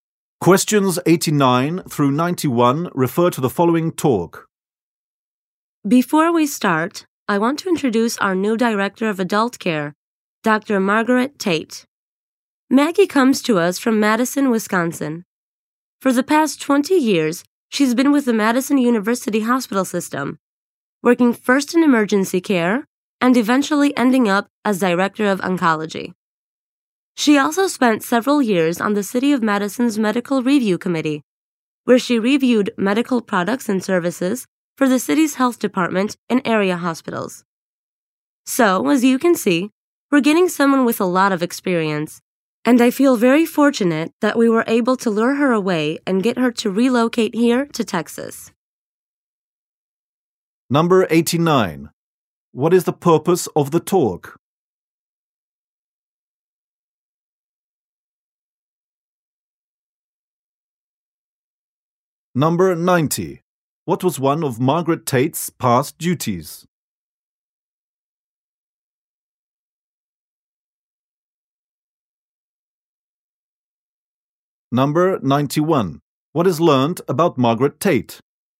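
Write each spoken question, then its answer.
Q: What is the purpose of the talk?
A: To introduce the new Director of Adult Care

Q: What was one of Margaret Tate's past duties?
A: Reviewing medical products and services for the city (or Director of Oncology)

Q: What is learned about Margaret Tate?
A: She moved from Wisconsin to Texas and has a lot of experience.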